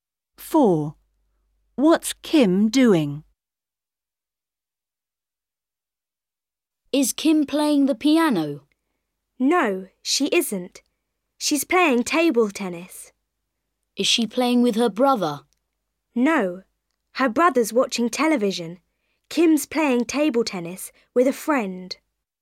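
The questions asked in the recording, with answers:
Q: What's Kim doing?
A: playing table tennis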